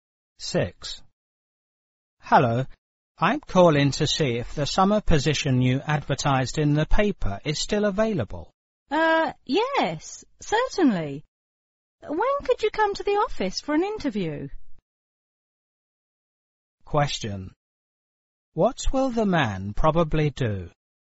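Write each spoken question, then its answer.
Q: What will the man probably do?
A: Go to the office for a job interview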